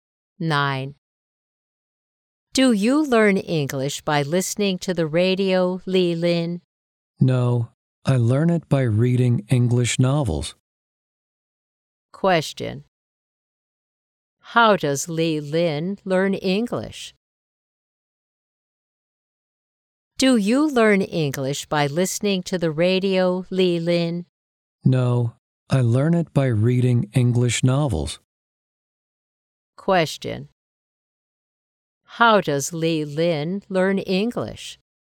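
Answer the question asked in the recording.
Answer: By reading English novels.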